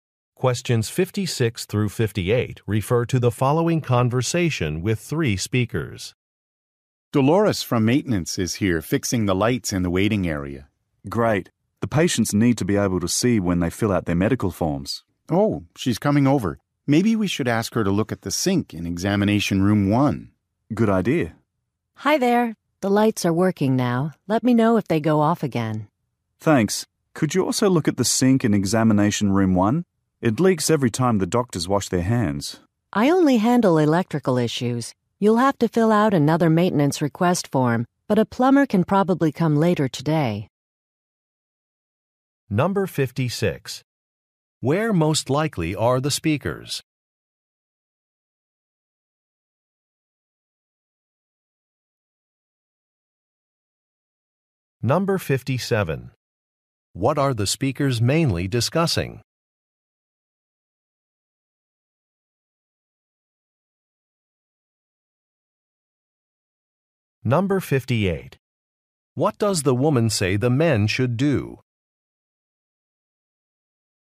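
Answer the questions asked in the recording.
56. At a medical clinic
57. Maintenance repairs
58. Fill out another maintenance request form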